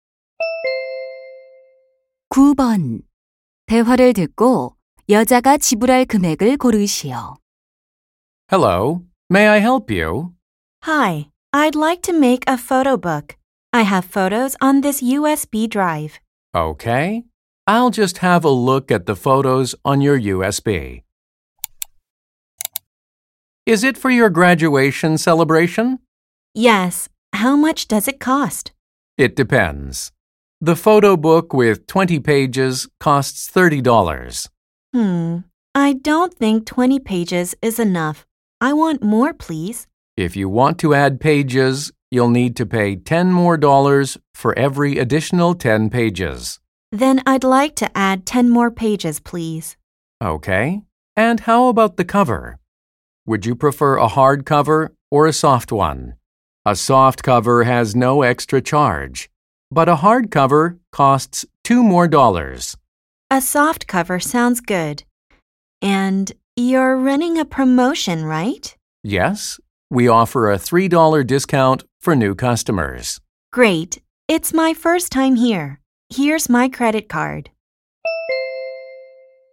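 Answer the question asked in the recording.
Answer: $37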